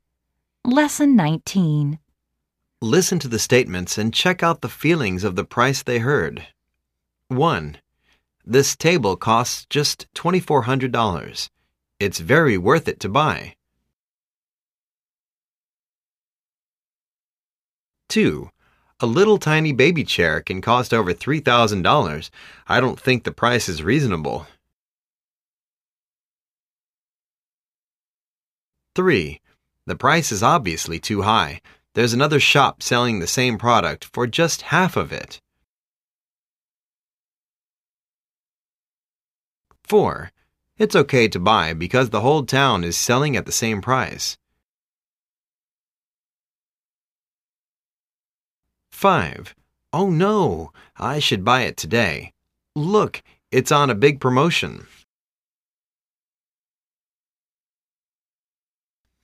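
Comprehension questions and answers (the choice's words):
Listen to the statements and check out feelings of the price they hear.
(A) Cheap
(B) Expensive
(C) Reasonable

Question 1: This table costs just 2400. lt's very it worth it to buy.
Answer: Cheap

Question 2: A little tiny baby chair can cost over $3000. I don't think the price is reasonable.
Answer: Expensive

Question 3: The price is obviously too high. There's another shop selling the same product for just half of it.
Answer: Expensive

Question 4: It'S ok to buy because the whole town is selling at the same price.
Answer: Reasonable

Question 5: Oh, no...!I should buy it today. Look!lt's on a big promotion.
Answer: Cheap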